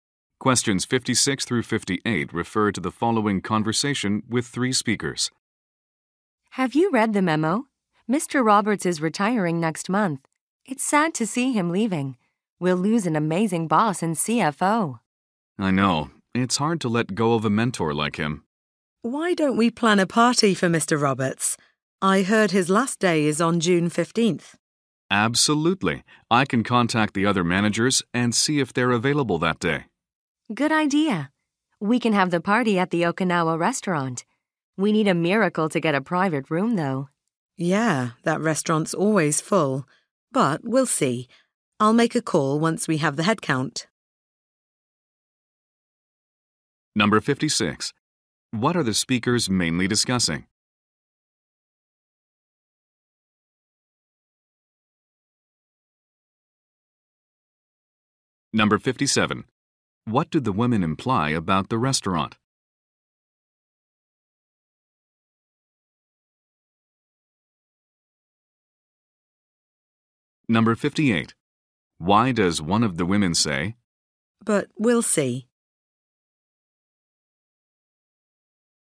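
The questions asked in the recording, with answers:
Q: What are the speakers mainly discussing?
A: Planning a retirement party for Mr. Roberts.

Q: What do the women imply about the restaurant?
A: It is hard to get a private room there.

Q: Why does one of the women say,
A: She is not sure they can get a room.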